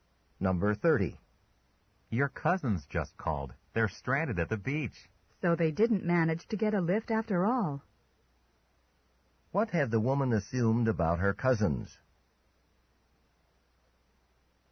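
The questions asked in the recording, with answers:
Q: What had the woman assumed about her cousins?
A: That they had gotten a ride.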